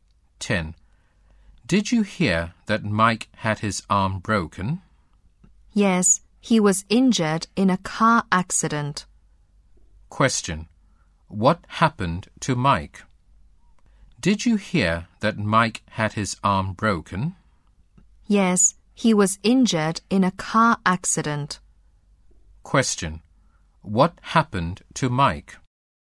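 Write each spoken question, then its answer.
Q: What happened to Mike?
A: He broke his arm in a car accident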